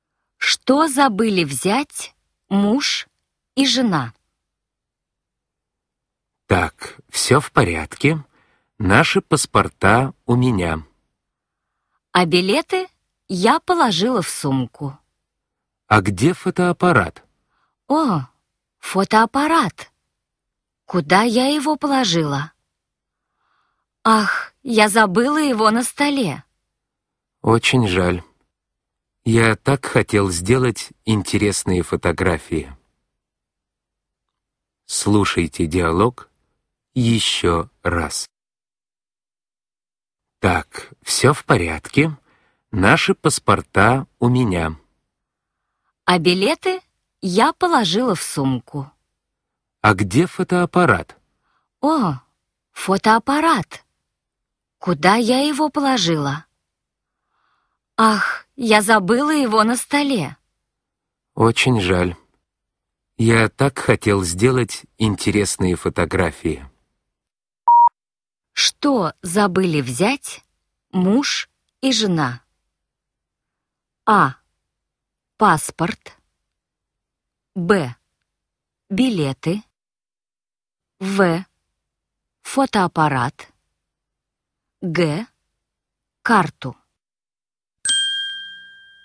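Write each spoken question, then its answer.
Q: Что забыли взять муж и жена?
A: В: Фотоаппарат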